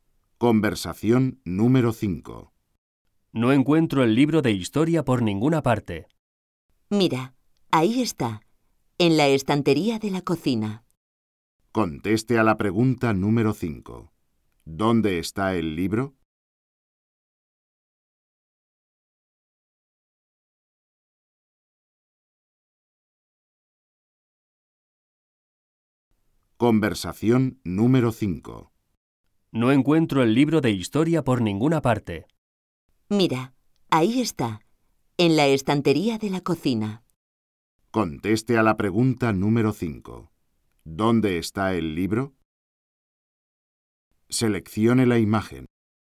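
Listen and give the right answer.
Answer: En la estantería de la cocina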